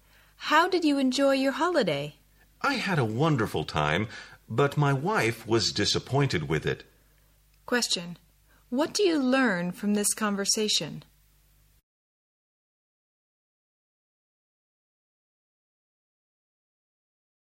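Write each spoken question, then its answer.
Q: What do you learn from this conversation?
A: The speaker enjoyed the holiday but his wife was disappointed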